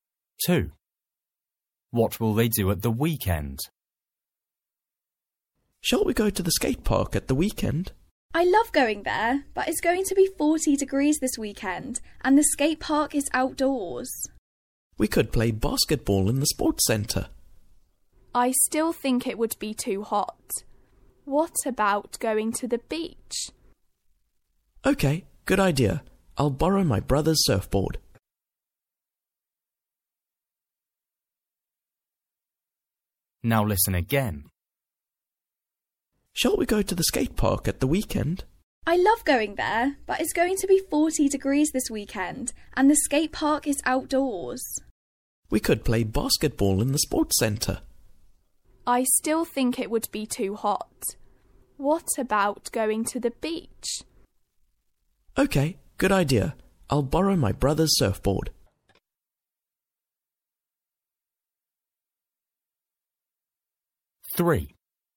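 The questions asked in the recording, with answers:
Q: What will they do at the weekend?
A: go to the beach (surfing)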